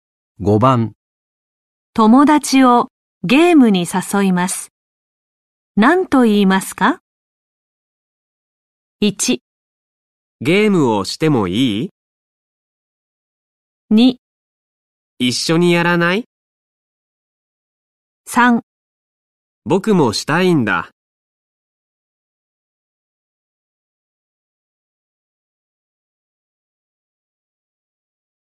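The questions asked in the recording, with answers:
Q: 友達をゲームに誘います。何と言いますか?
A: 2: 一緒にやらない?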